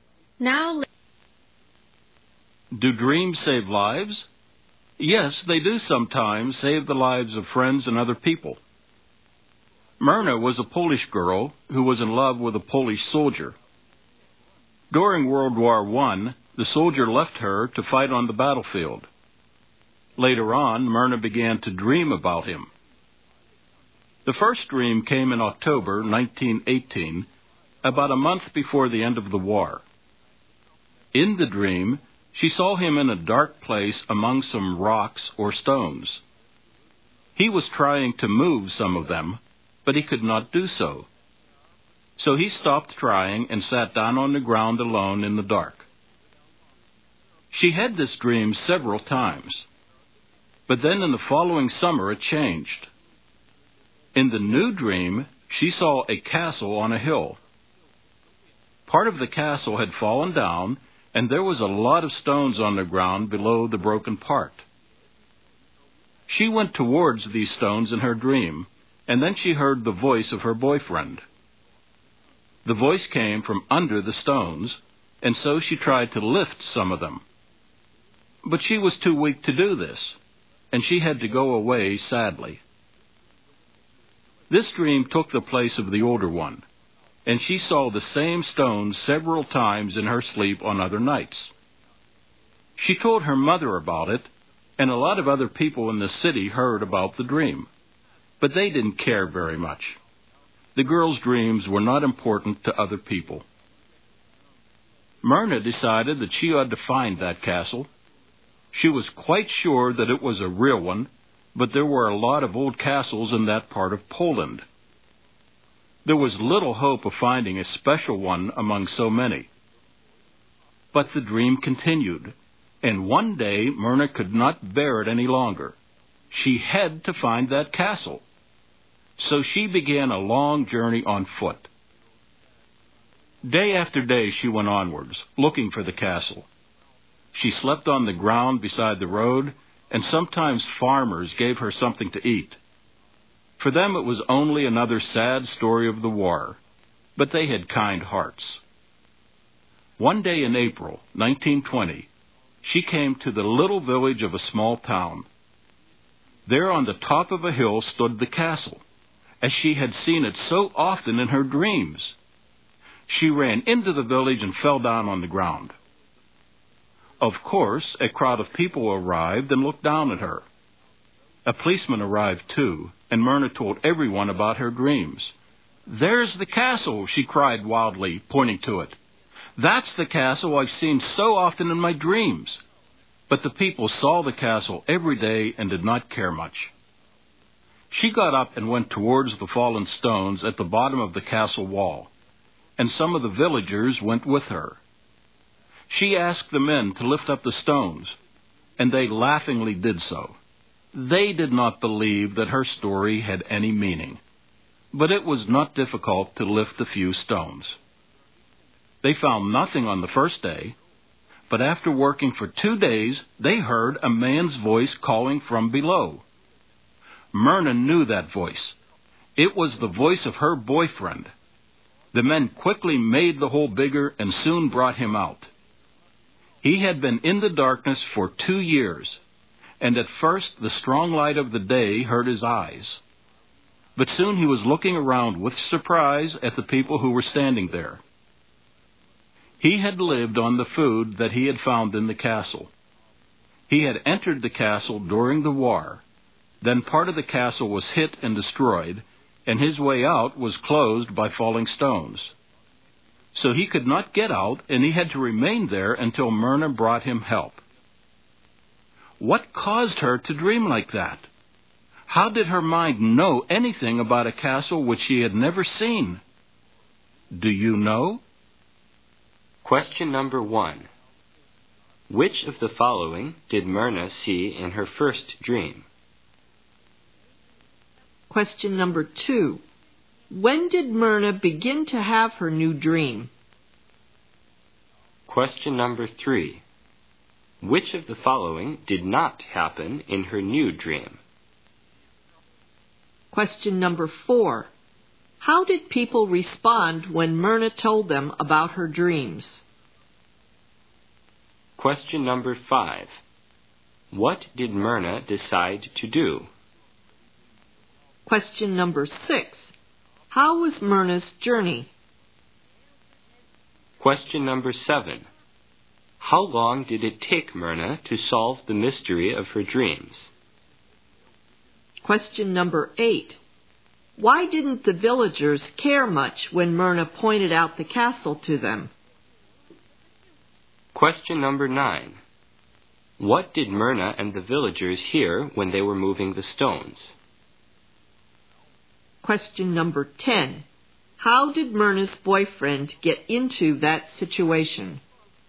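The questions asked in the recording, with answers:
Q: Which of the following did Myrna see in her first dream?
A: Her boyfriend in a dark place among rocks or stones

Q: When did Myrna begin to have her new dream?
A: The following summer (1919)

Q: How did people respond when Myrna told them about her dreams?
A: They didn't care very much

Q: What did Myrna decide to do?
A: Find the castle

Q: How was Myrna's journey?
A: Long and hard, on foot, sleeping beside the road

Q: Why didn't the villagers care much when Myrna pointed out the castle to them?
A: They saw the castle every day

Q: What did Myrna and the villagers hear when they were moving the stones?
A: A man's voice, her boyfriend's, calling from below

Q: How did Myrna's boyfriend get into that situation?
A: He went into the castle during the war, and falling stones blocked his way out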